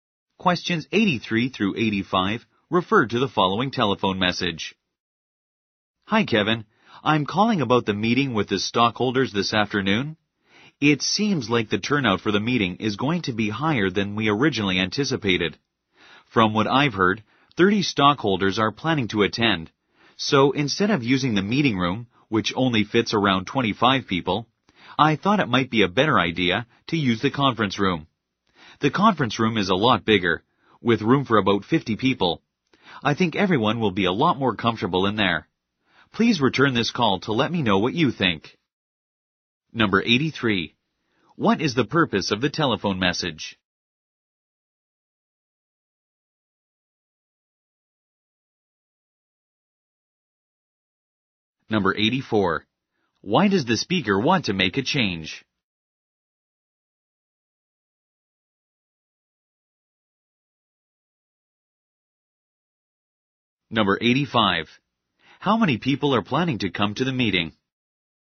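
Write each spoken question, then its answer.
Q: What is the purpose of the telephone message?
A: To suggest changing the meeting room

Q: Why does the speaker want to make a change?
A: More people will attend than expected

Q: How many people are planning to come to the meeting?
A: 30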